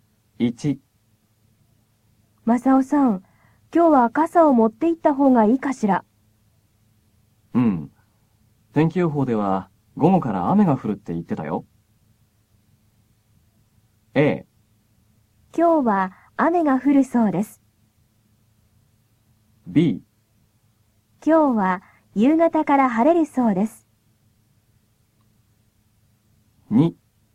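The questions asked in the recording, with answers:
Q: 今日は夕方から晴れるそうです。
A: A: 今日は雨が降るそうです。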